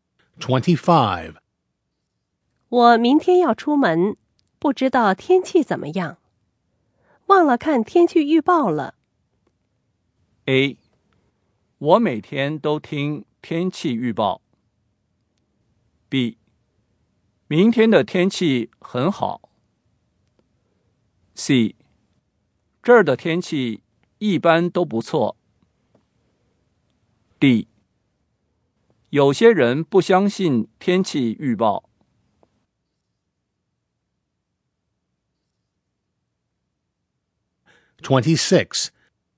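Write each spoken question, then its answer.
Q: 我明天要出门,不知道天气怎么样,忘了看天气预报了。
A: B: 明天的天气很好。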